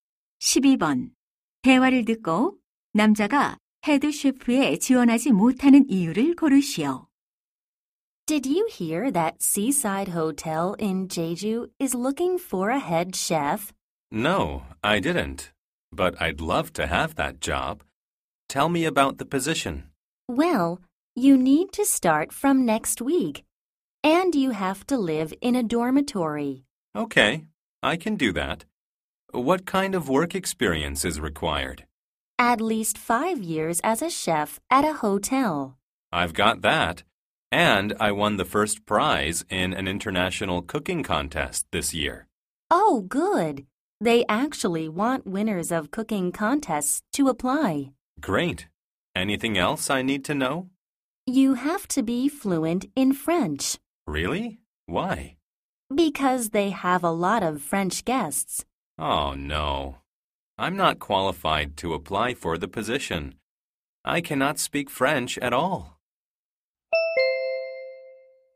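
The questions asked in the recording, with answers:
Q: 대화를 듣고 남자가 헤드 셰프에 지원하지 못하는 이유를 고르시오.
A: 프랑스어를 전혀 못해서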